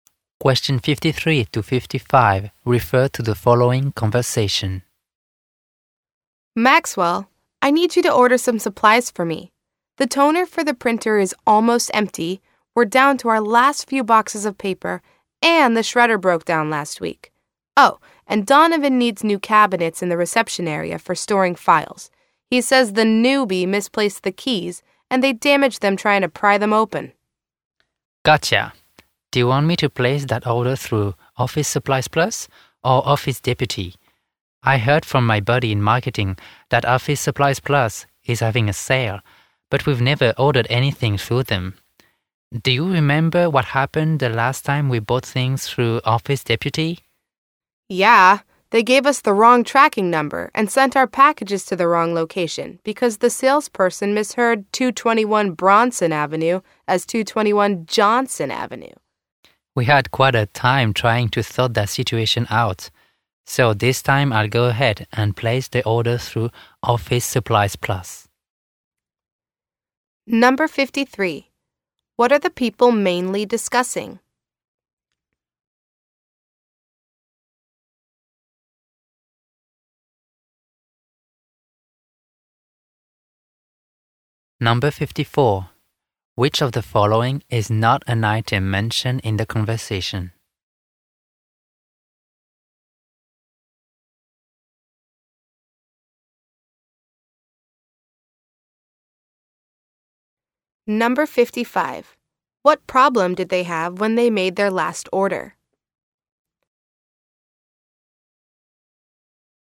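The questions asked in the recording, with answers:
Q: What are the people mainly discussing?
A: Ordering office supplies

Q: What problem did they have when they made their last order?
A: Packages were sent to the wrong address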